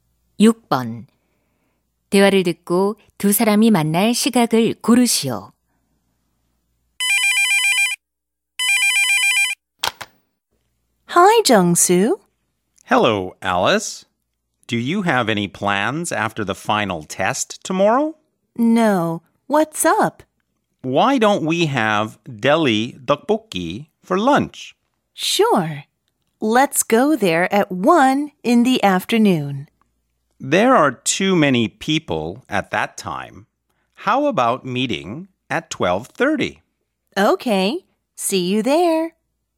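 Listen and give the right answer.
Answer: 12시 30분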